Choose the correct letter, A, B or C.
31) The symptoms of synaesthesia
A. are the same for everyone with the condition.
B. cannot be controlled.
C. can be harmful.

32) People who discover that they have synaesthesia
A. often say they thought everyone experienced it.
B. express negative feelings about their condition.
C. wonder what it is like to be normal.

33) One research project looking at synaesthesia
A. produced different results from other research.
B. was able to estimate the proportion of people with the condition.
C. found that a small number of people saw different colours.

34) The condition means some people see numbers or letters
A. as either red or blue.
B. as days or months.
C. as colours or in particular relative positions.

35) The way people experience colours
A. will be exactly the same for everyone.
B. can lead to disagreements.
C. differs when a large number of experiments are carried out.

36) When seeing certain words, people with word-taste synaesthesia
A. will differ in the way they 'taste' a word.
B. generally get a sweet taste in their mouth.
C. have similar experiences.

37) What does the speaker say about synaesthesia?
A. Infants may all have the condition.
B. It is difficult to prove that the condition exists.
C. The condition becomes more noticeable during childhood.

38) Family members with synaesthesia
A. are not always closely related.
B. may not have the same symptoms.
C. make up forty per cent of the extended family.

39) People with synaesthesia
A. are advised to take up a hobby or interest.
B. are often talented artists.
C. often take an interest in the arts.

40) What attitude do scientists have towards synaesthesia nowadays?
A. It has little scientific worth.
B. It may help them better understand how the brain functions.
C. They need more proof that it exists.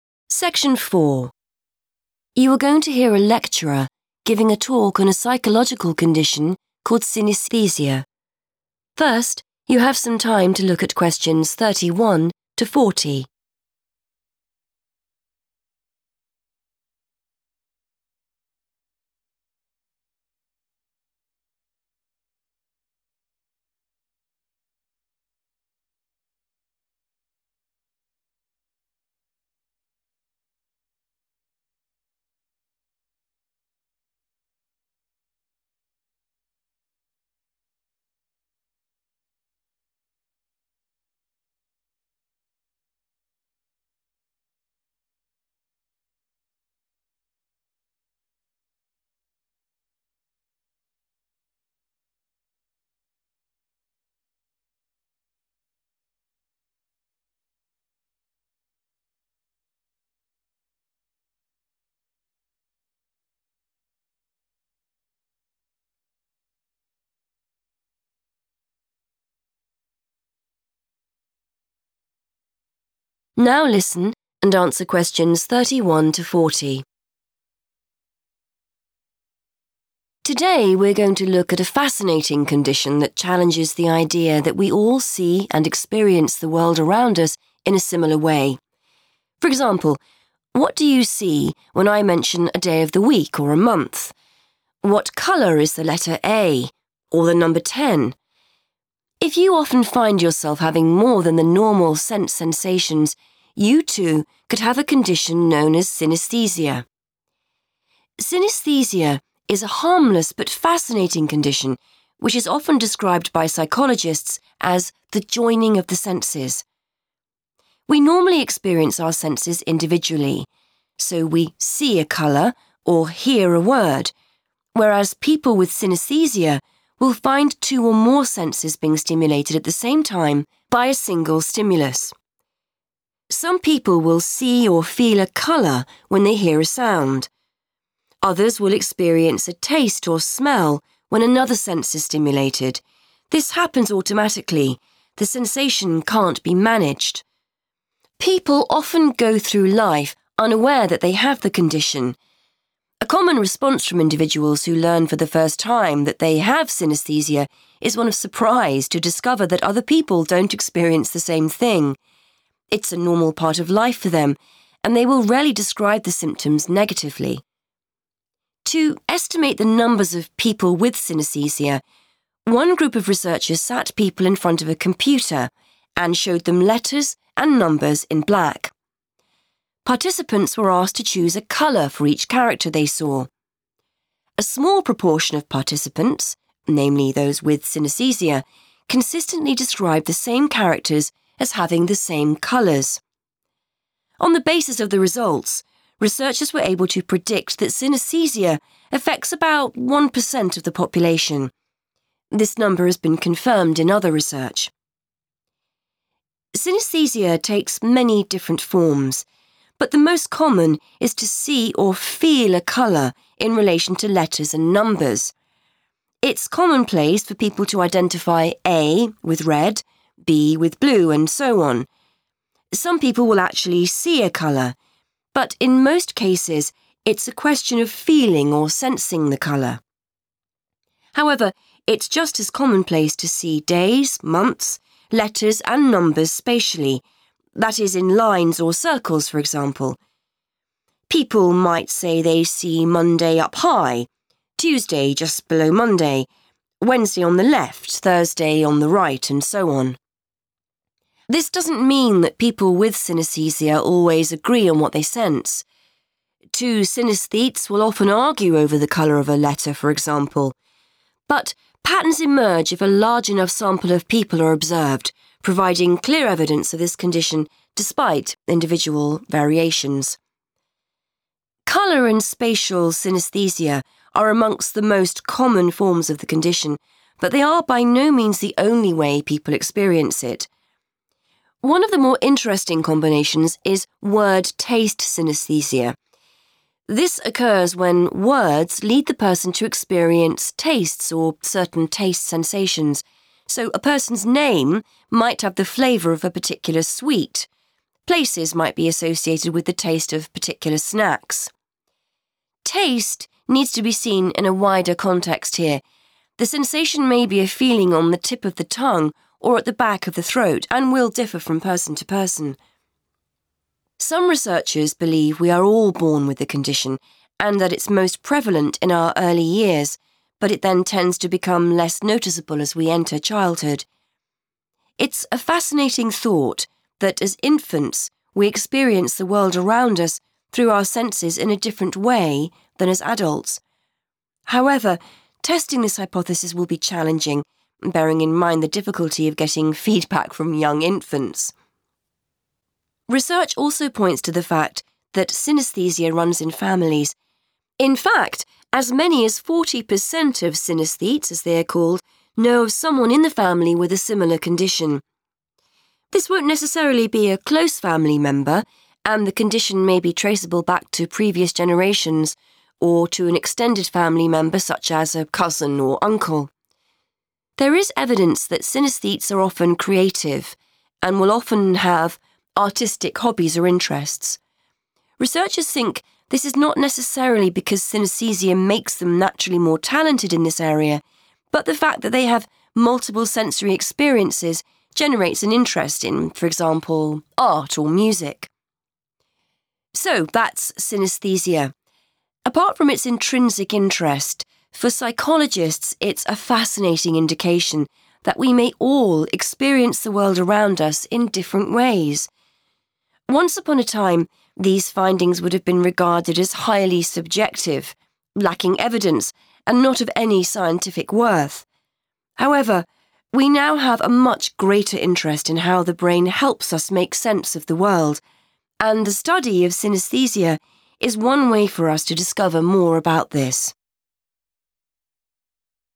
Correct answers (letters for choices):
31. B
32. A
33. B
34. C
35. B
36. A
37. A
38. A
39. C
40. B

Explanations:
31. The correct answer is B because the transcript states that the condition happens automatically and cannot be managed. This means the person does not decide to have these feelings; they just happen. Choice A is incorrect because the speaker mentions that things like the color of a letter often vary from person to person. Choice C is incorrect because the speaker explicitly describes the condition as harmless.
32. The correct answer is A because the text explains that people are often surprised to learn that others do not see or feel the world in the same way. This shows they believed their way of seeing things was universal. We can ignore choice B because the text says they rarely talk about their condition in a bad or negative way. Choice C is not mentioned in the text at all.
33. The correct answer is B because the transcript describes a specific study where researchers tested people using computers. By observing how a small group of participants reacted to letters and numbers, the researchers were able to 'predict' or 'estimate' that synaesthesia affects about one percent of the 'population' (the total group of people). This matches the idea of estimating the 'proportion' (a part of a whole) mentioned in the answer choice.
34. The correct answer is C because the talk explains two main ways people with synaesthesia see letters and numbers. First, it says the most common form is seeing or feeling a colour for them. Then, it explains that it is also very common to see them spatially. 'Spatially' means seeing them in organized positions, like in a line or a circle.
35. The correct answer is B because the text mentions that people with synaesthesia often have different experiences. For example, the lecturer states that two people with the condition might argue about what color a specific letter is. This shows they do not always see the same thing, leading to disagreements.
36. The correct answer is A because the lecturer explains that 'word-taste synaesthesia' results in taste sensations that vary among individuals. While one person might taste something sweet, another might feel a sensation in a different part of their mouth or throat. The use of the word 'differ' and the phrase 'from person to person' directly supports the idea that their experiences are not identical or similar, but rather unique to each individual.
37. The correct answer is A because the speaker talks about a theory that everyone is born with synaesthesia. The text uses the phrase 'early years' to describe the time when people are infants (babies). It says the condition is 'most prevalent' (most common) during this time, even though it usually fades away as children get older.
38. The correct answer is A because the speaker says that while the condition runs in families, the relative with the condition does not have to be a 'close' family member. It can be someone from the 'extended' family, like a cousin or an uncle, or even someone from past generations. The 40 percent mentioned in the talk refers to how many synaesthetes know someone in their family with the condition, not the percentage of the family that has it.
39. The correct answer is C because the text says that people with synaesthesia often have hobbies or interests related to art. This happens because experiencing many senses at the same time makes them interested in these things. The text clearly states this is about their 'interest' and 'hobbies' rather than how skilled or 'talented' they are, which makes choice C the best fit. Choice B is incorrect because the researcher says they are not necessarily more talented. Choice A is incorrect because the text does not say anyone 'advised' or told them to have these hobbies.
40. The correct answer is B because the speaker explains that scientific views have changed. In the past, people did not think this condition was important for science. Now, researchers have a lot of interest in how the brain works, and they believe studying synaesthesia is a good way to find out more information about it.

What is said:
Lecturer: Today we're going to look at a fascinating condition that challenges the idea that we all see and experience the world around us in a similar way. For example, what do you see when I mention a day of the week or a month? What colour is the letter A? Or the number 10? If you often find yourself having more than the normal sense sensations, you too could have a condition known as synaesthesia.
Synaesthesia is a harmless but fascinating condition which is often described by psychologists as the joining of the senses. We normally experience our senses individually, so we see a colour or hear a word, whereas people with synaesthesia will find two or more senses being stimulated at the same time by a single stimulus. Some people will see or feel a colour when they hear a sound. Others will experience a taste or smell when another sense is stimulated. This happens automatically - the sensation can't be managed.
People often go through life unaware that they have the condition. A common response from individuals who learn for the first time that they have synaesthesia is one of surprise to discover that other people don't experience the same thing. It's a normal part of life for them and they will rarely describe the symptoms negatively.
To estimate the numbers of people with synaesthesia, one group of researchers sat people in front of a computer and showed them letters and numbers in black. Participants were asked to choose a colour for each character they saw. A small proportion of participants, namely those with synaesthesia, consistently described the same characters as having the same colours. On the basis of the results, researchers were able to predict that synaesthesia affects about one per cent of the population. This number has been confirmed in other research.
Synaesthesia takes many different forms but the most common is to see or feel a colour in relation to letters and numbers. It's commonplace for people to identify A with red, B with blue, and so on. Some people will actually see a colour, but in most cases it's a question of feeling or sensing the colour. However, it's just as commonplace to see days, months, letters and numbers spatially, that is in lines or circles, for example. People might say they see Monday up high, Tuesday just below Monday, Wednesday on the left, Thursday on the right, and so on.
This doesn't mean that people with synaesthesia always agree on what they sense. Two synaesthetes will often argue over the colour of a letter, for example. But patterns emerge if a large enough sample of people are observed, providing clear evidence of this condition despite individual variations.
Colour and spatial synaesthesia are amongst the most common forms of the condition but they are by no means the only way people experience it. One of the more interesting combinations is word-taste synaesthesia. This occurs when words lead the person to experience tastes or certain taste sensations. So a person's name might have the flavour of a particular sweet, places might be associated with the taste of particular snacks. Taste needs to be seen in a wider context here. The sensation may be a feeling on the tip of the tongue or at the back of the throat and will differ from person to person.
Some researchers believe we are all born with the condition and that it's most prevalent in our early years but it then tends to become less noticeable as we enter childhood. It's a fascinating thought that as infants we experience the world around us through our senses in a different way than as adults. However, testing this hypothesis will be challenging, bearing in mind the difficulty of getting feedback from young infants!
Research also points to the fact that synaesthesia runs in families. In fact, as many as 40 per cent of synaesthetes, as they are called, know of someone in the family with a similar condition. This won't necessarily be a close family member and the condition may be traceable back to previous generations or to an extended family member such as a cousin or uncle.
There is evidence that synaesthetes are often creative and will often have artistic hobbies or interests. Researchers think this is not necessarily because synaesthesia makes them naturally more talented in this area but the fact that they have multiple sensory experiences generates an interest in, for example, art or music.
So that's synaesthesia. Apart from its intrinsic interest, for psychologists it's a fascinating indication that we may all experience the world around us in different ways. Once upon a time, these findings would have been regarded as highly subjective, lacking evidence and not of any scientific worth. However, we now have a much greater interest in how the brain helps us make sense of the world, and the study of synaesthesia is one way for us to discover more about this.